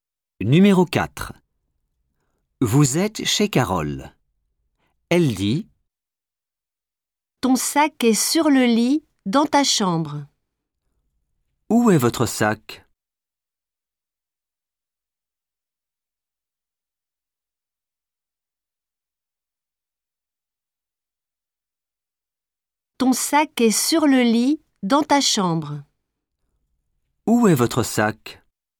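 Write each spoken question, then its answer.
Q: « Où est votre sac ? »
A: sur le lit, dans la chambre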